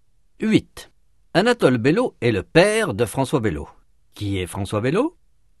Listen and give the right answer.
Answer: Le fils d'Anatole.